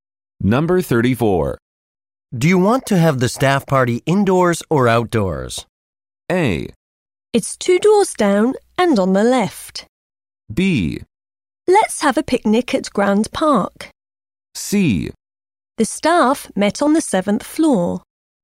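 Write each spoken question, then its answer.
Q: Do you want to have the staff party indoors or outdoors?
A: B: Let's have a picnic at Grand Park.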